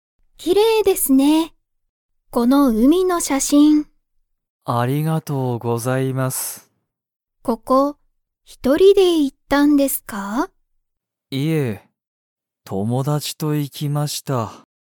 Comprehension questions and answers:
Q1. 鈴木すずきさんは、海うみに一人ひとりで行いきましたか?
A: いいえ

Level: Level 1